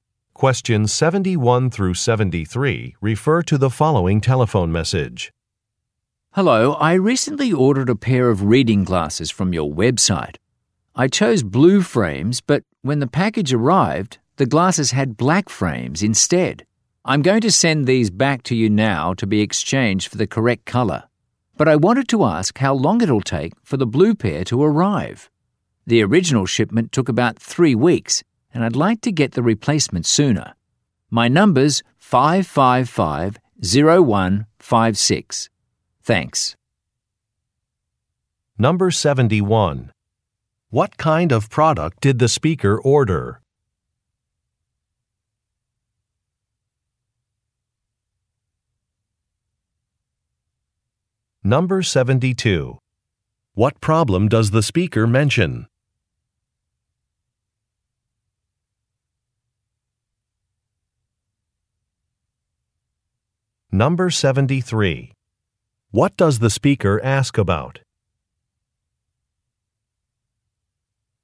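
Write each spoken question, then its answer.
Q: What kind of product did the speaker order?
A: Reading glasses

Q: What problem does the speaker mention?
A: The glasses arrived with black frames instead of blue ones

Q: What does the speaker ask about?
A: How long it will take for the replacement blue pair to arrive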